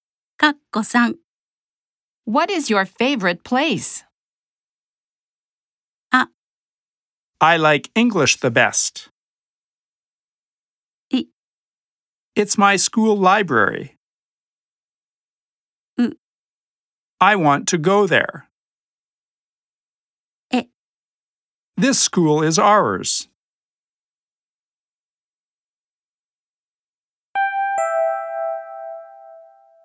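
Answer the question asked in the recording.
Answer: I: It's my school library.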